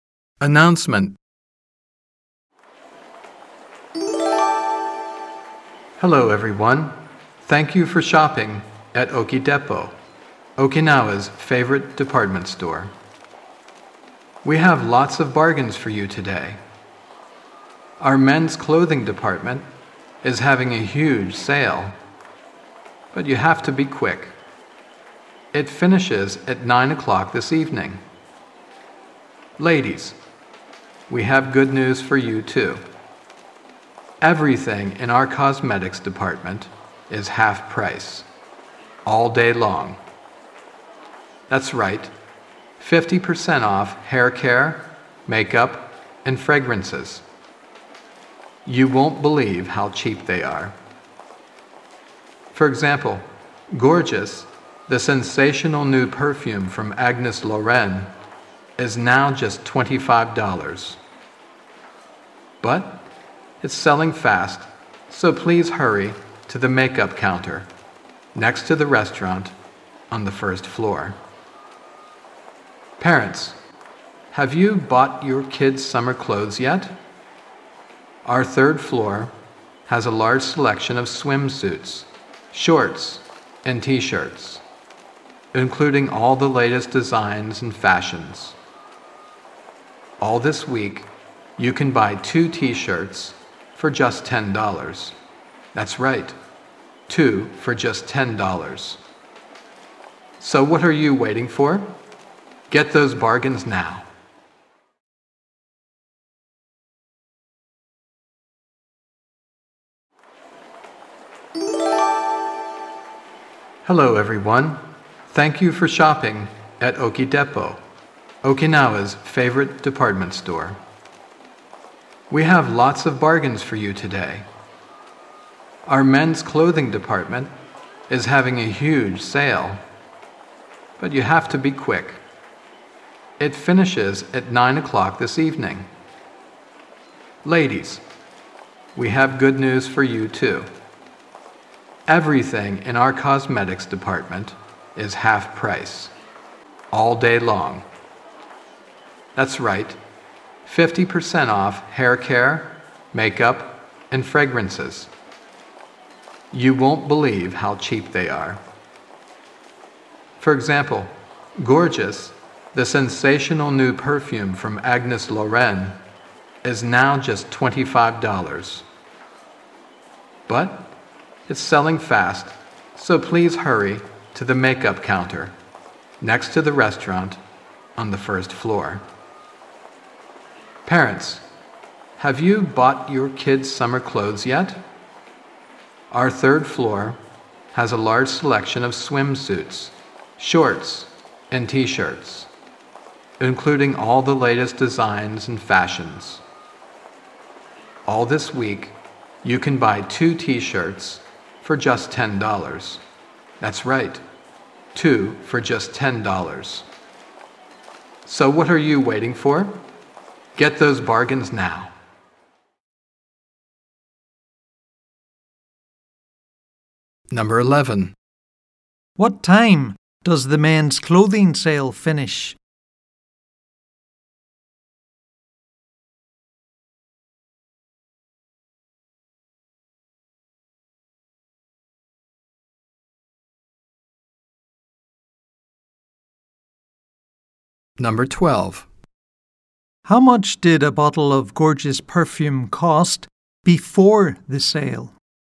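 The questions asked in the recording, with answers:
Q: What time does the men's clothing sale finish?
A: At 9 o'clock this evening

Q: How much did a bottle of gorgeous perfume cost before the sale?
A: $50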